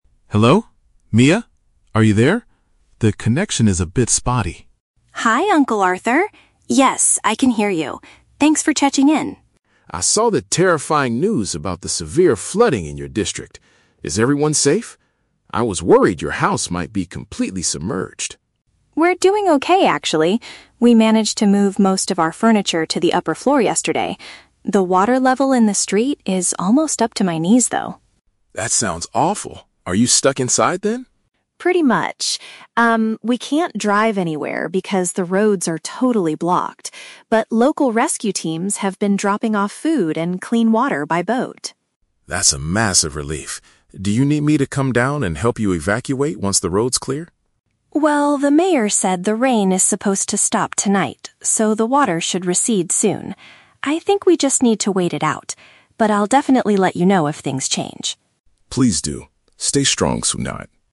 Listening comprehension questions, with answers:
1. What happened to the belongings in Mia's house?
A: They were relocated to a higher level.

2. How is Mia's family getting their daily necessities right now?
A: Emergency workers are delivering them over water.

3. What does Mia intend to do next?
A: She decides to stay inside her home until conditions improve.

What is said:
Arthur: Hello? Mia? Are you there? The connection is a bit spotty.
Mia: Hi, Uncle Arthur! Yes, I can hear you. Thanks for checking in.
Arthur: I saw the terrifying news about the severe flooding in your district. Is everyone safe? I was worried your house might be completely submerged.
Mia: We're doing okay, actually. We managed to move most of our furniture to the upper floor yesterday. The water level in the street is almost up to my knees, though.
Arthur: That sounds awful. Are you stuck inside, then?
Mia: Pretty much. Um, we can't drive anywhere because the roads are totally blocked. But local rescue teams have been dropping off food and clean water by boat.
Arthur: That's a massive relief. Do you need me to come down and help you evacuate once the roads clear?
Mia: Well, the mayor said the rain is supposed to stop tonight, so the water should recede soon. I think we just need to wait it out. But I'll definitely let you know if things change.